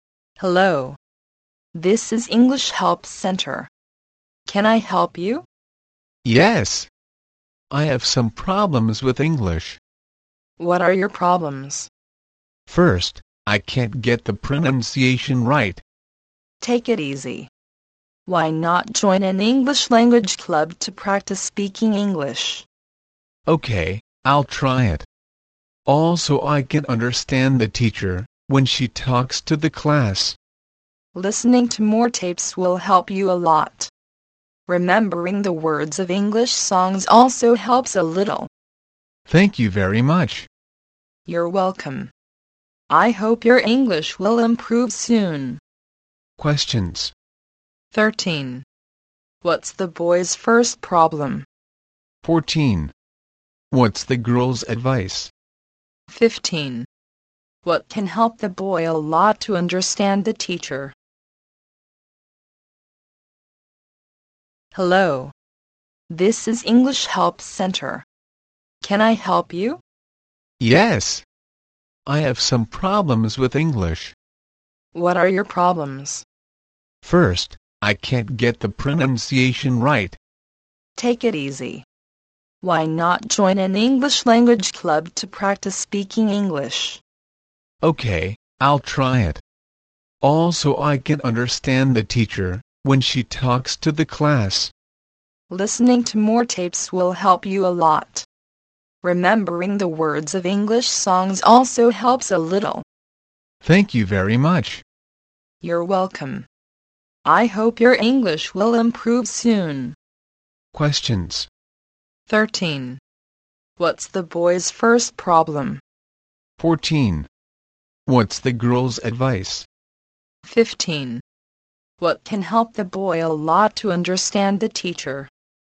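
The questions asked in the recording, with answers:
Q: What's the boy's first problem?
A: He can't get the pronunciation right

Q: What's the girl's advice?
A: Join an English language club to practice speaking

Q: What can help the boy a lot to understand the teacher?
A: Listening to more tapes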